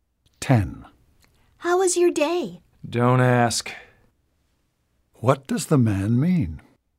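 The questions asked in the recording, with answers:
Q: What does the man mean?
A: He had a bad day.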